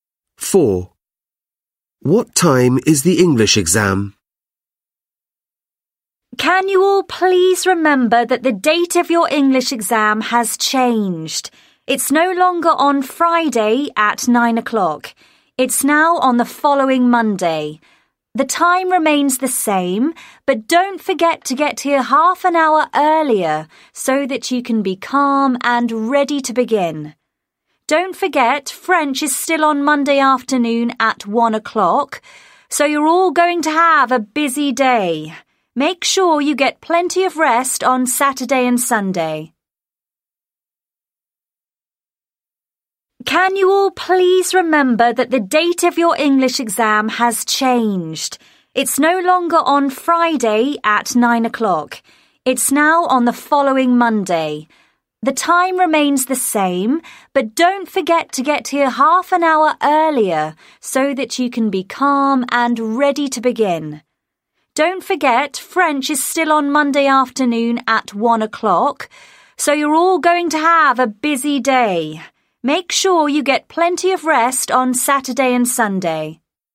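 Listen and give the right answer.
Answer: 9 o'clock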